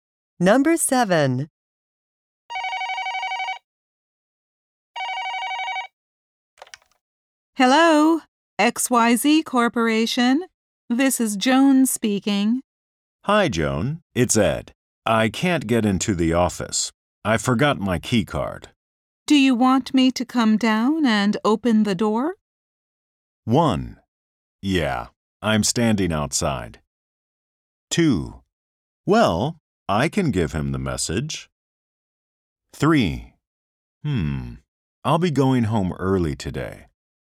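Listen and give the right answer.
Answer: 1: Yeah, I'm standing outside.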